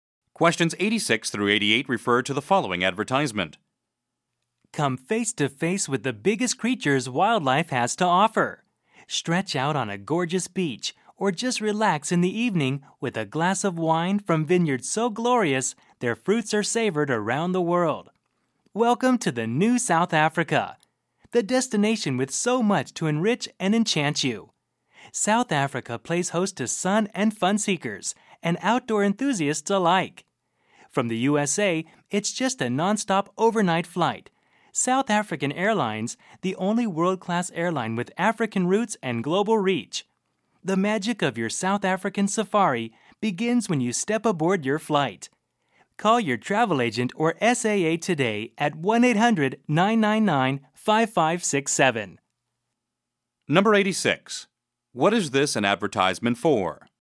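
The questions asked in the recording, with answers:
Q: What is this an advertisement for?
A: South African Airlines / travel to South Africa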